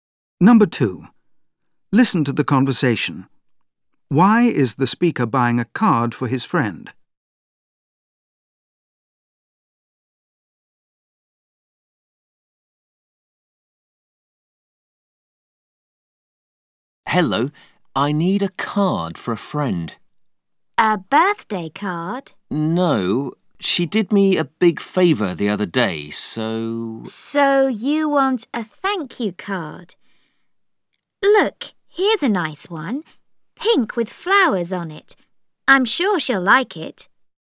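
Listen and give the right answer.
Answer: To thank her for a favour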